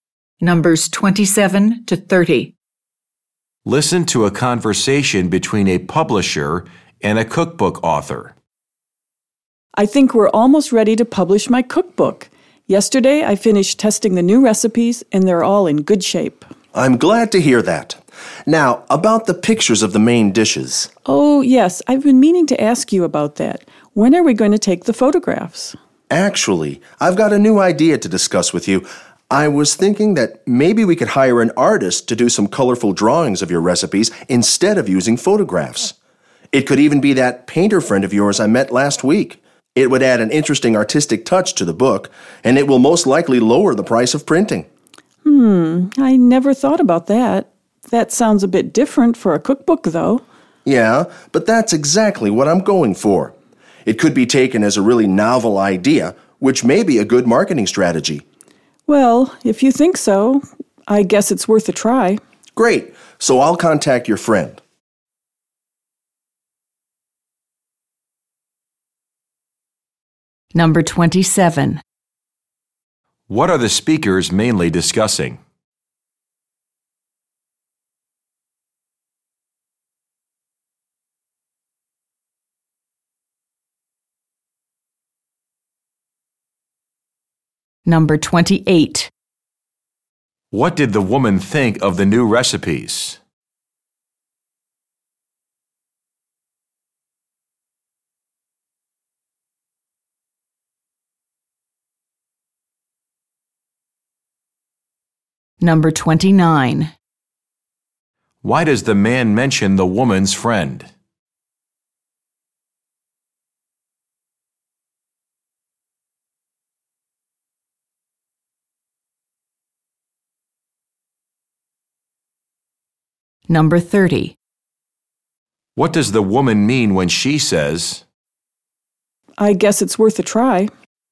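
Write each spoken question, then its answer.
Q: What are the speakers mainly discussing?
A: Using drawings instead of photographs in the cookbook

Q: What did the woman think of the new recipes?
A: They are all in good shape

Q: Why does the man mention the woman's friend?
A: To suggest hiring the friend to do the drawings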